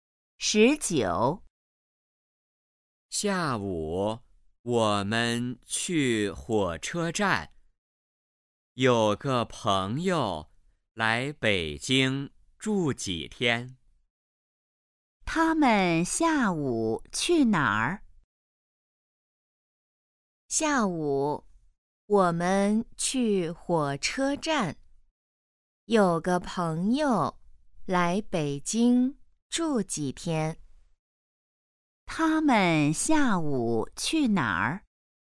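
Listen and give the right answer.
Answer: 火车站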